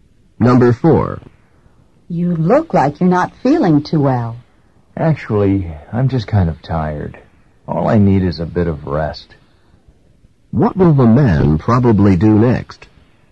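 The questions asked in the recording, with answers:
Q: What will the man probably do next?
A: Rest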